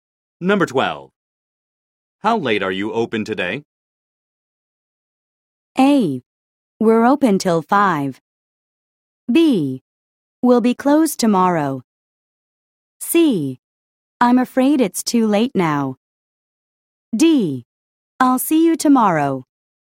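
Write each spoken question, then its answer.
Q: How late are you open today?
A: A: We're open till 5.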